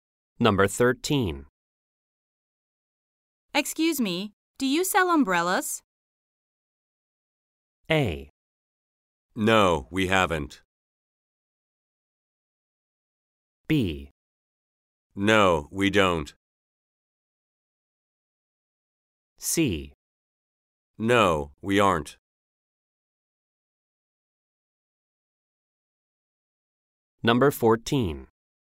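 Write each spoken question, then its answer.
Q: Excuse me, do you sell umbrellas?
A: B: No, we don't.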